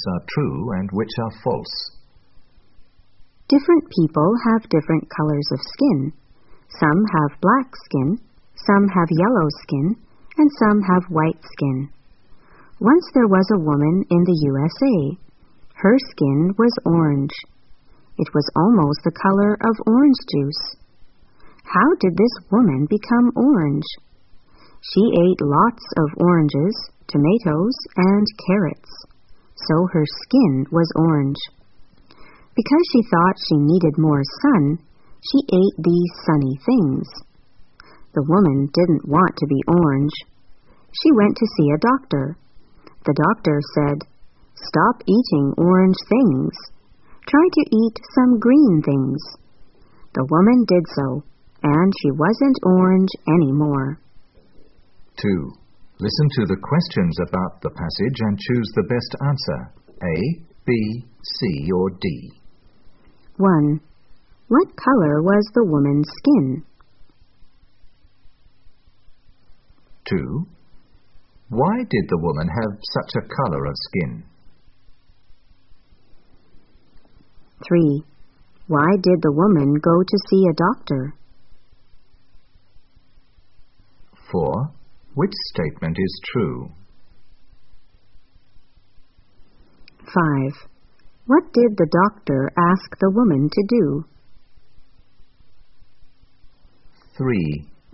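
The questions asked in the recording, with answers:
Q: What color was the woman's skin?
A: Orange

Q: Why did the woman have such a color of skin?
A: She ate lots of oranges, tomatoes, and carrots.

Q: Why did the woman go to see a doctor?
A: She didn't want to be orange.

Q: What did the doctor ask the woman to do?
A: Stop eating orange things and eat some green things.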